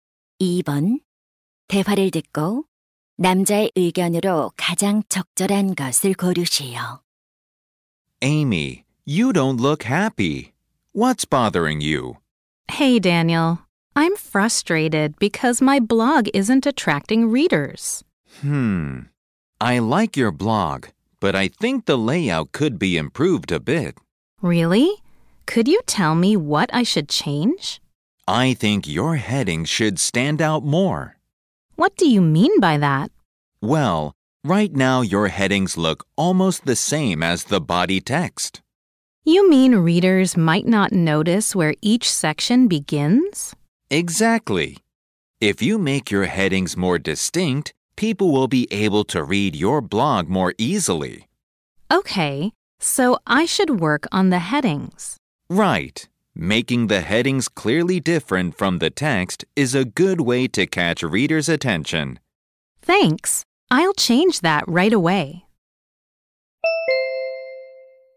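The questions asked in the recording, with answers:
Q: 대화를 듣고 남자의 의견으로 가장 적절한 것을 고르시오.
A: 블로그 제목(헤딩)을 본문과 뚜렷이 구별되게 해야 한다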